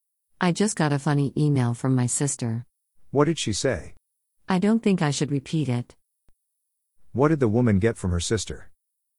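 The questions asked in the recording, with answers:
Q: What did the woman get from her sister?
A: A funny email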